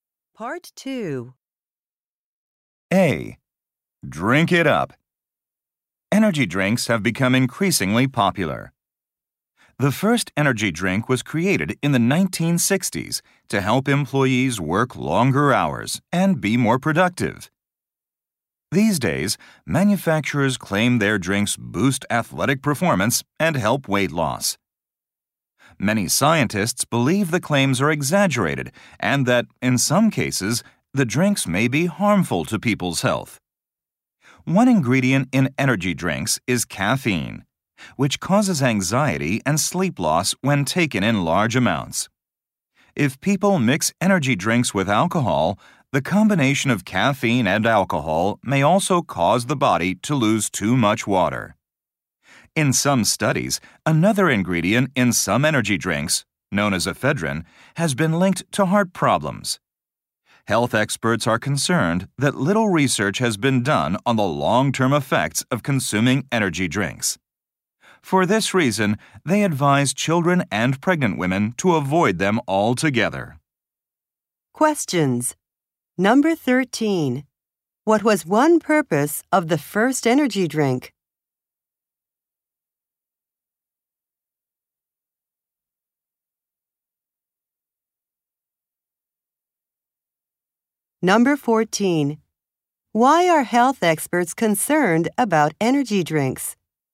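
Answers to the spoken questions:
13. To help employees work longer hours and be more productive.
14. Little research has been done on their long-term effects.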